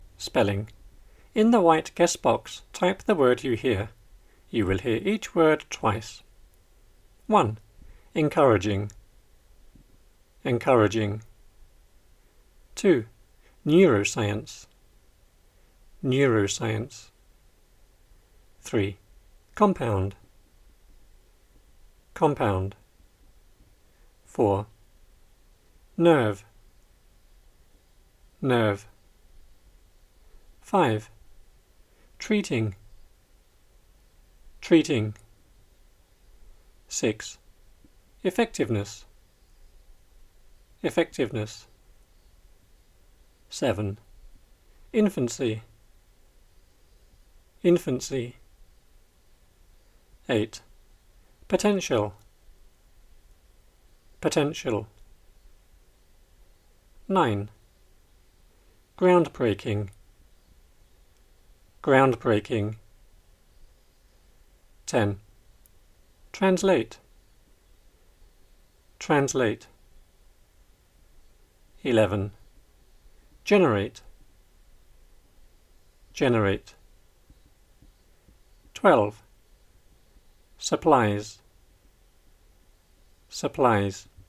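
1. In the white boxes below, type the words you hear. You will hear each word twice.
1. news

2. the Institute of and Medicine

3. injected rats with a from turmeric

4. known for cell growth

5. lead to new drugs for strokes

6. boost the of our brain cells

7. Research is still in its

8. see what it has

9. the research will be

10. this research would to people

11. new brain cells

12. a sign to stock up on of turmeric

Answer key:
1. Encouraging
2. Neuroscience
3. compound
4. nerve
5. treating
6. effectiveness
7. infancy
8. potential
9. groundbreaking
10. translate
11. generate
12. supplies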